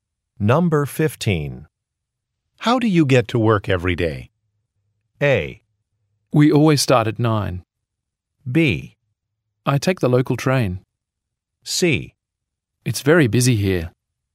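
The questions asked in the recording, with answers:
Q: How do you get to work every day?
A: B: I take the local train.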